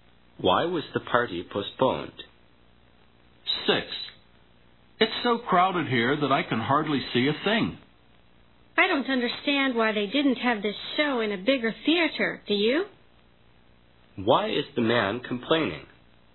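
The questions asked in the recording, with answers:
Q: Why is the man complaining?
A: The theater is too small and crowded.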